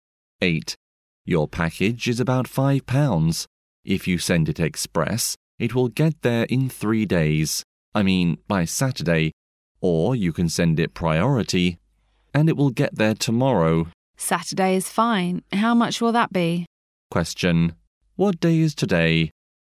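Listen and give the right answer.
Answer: Wednesday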